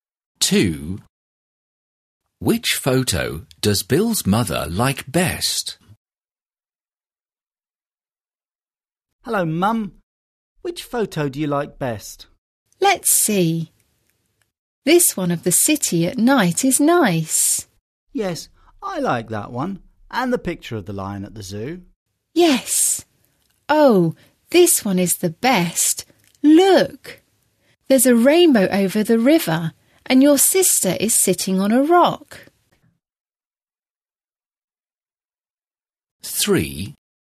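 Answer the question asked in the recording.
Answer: The one with a rainbow over the river and his sister sitting on a rock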